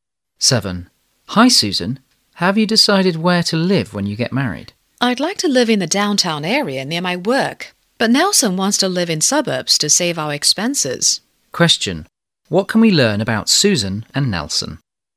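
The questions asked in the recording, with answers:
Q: What can we learn about Susan and Nelson?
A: They disagree about where to live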